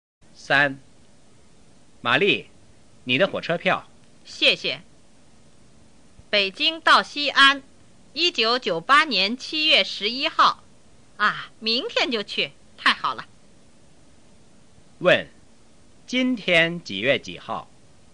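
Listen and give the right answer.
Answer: 1998年7月10号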